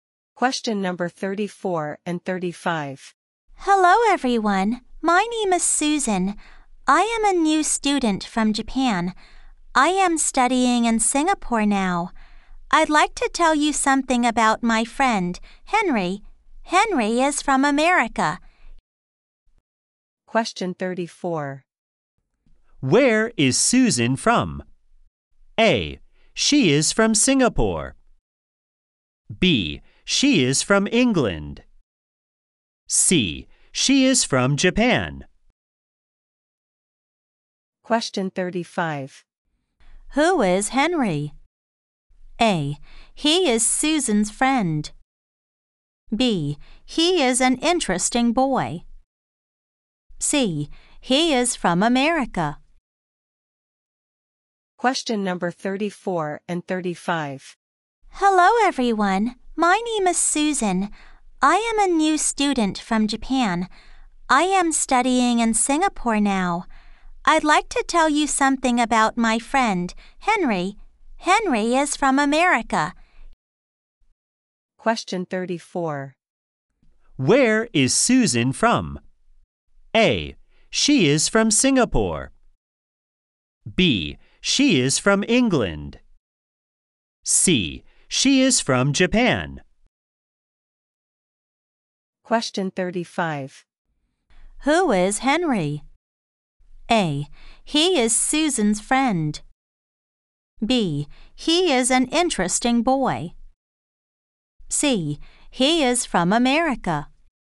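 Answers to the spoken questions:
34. C: She is from Japan.
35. A: He is Susan's friend.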